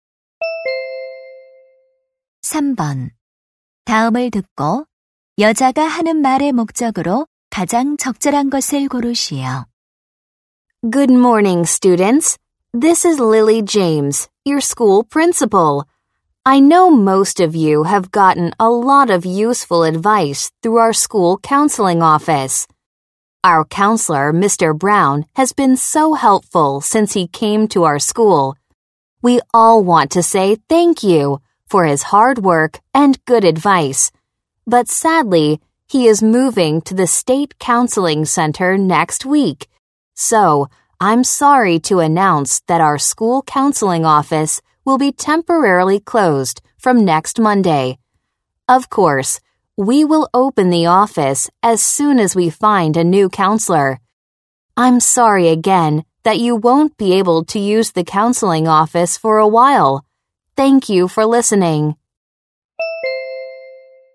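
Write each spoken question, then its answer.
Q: 다음을 듣고 여자가 하는 말의 목적으로 가장 적절한 것을 고르시오.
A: 학교 상담실의 임시 폐쇄를 알리려고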